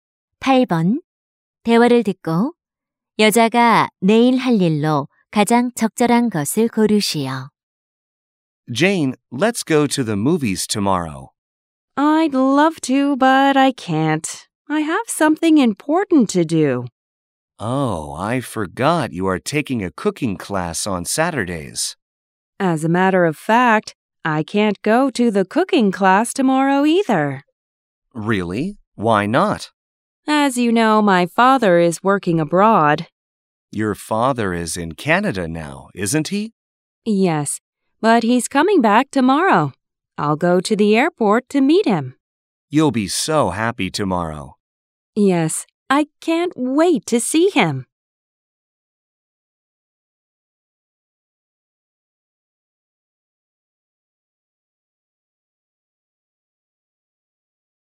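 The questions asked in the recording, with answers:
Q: 대화를 듣고 여자가 내일 할 일로 가장 적절한 것을 고르시오.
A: 공항에 아버지 마중 가기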